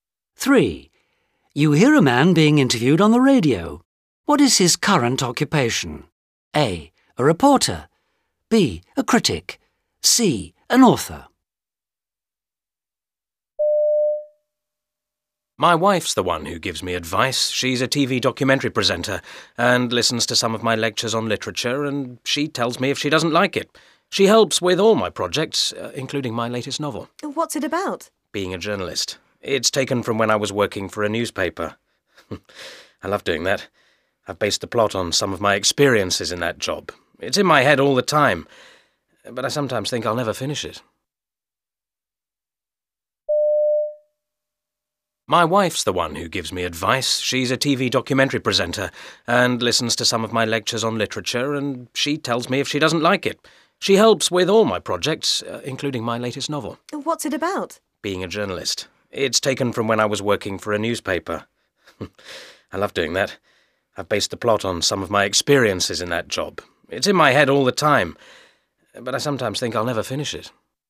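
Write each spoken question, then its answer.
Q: What is his current occupation?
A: C. An author.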